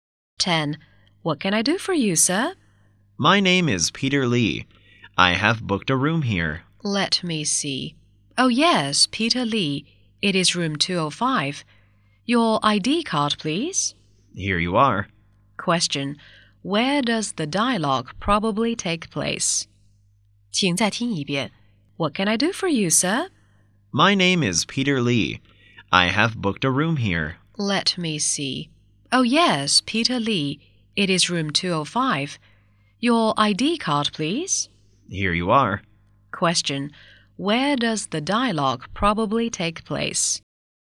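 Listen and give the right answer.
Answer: In a hotel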